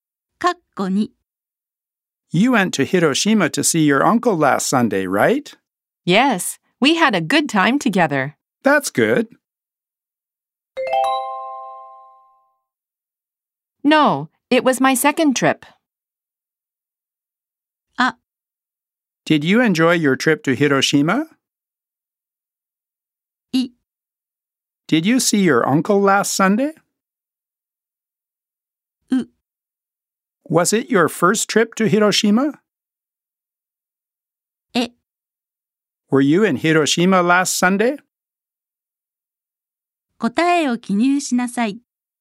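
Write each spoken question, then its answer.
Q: That's good.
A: う: Was it your first trip to Hiroshima?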